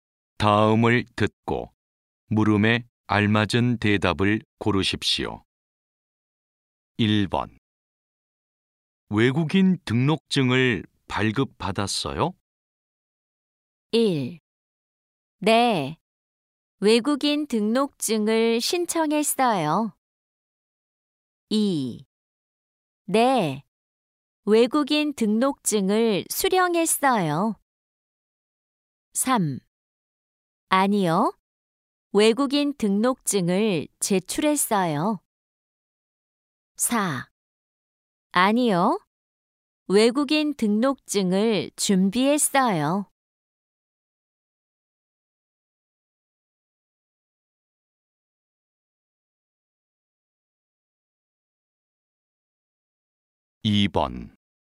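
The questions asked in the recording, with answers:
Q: 외국인 등록증을 발급받았어요?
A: 2: 네, 외국인 등록증을 수령했어요.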